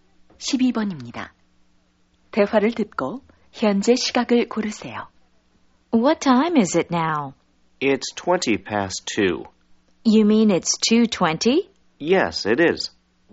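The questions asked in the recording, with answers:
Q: 대화를 듣고 현재 시각을 고르세요.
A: 2시 20분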